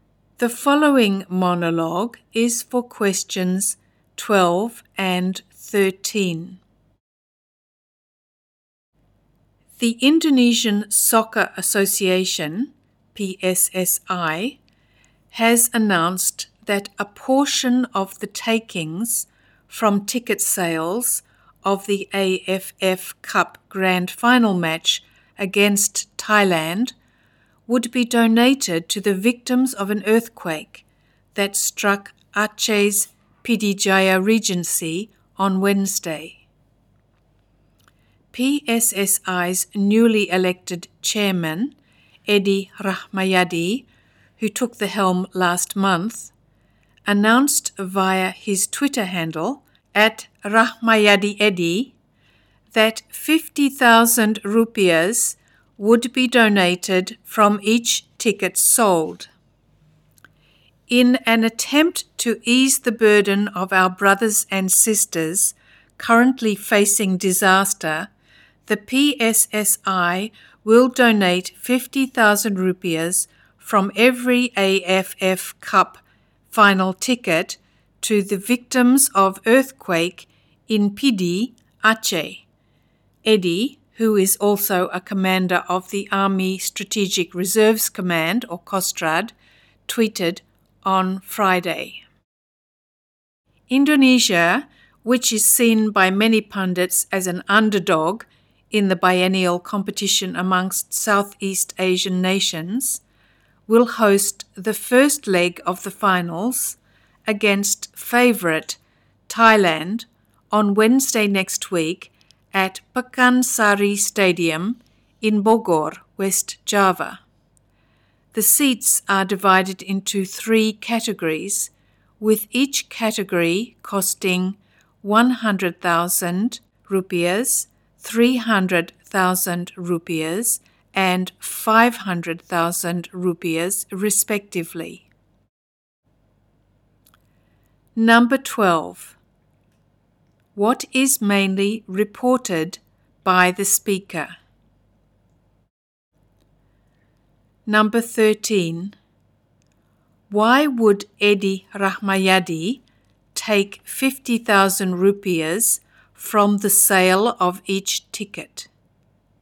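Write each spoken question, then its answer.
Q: What is mainly reported by the speaker?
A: PSSI will donate part of AFF Cup final ticket sales to Aceh earthquake victims

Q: Why would Edi Rahmayadi take 50,000 rupiahs from the sale of each ticket?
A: To donate it to the victims of the earthquake in Pidie, Aceh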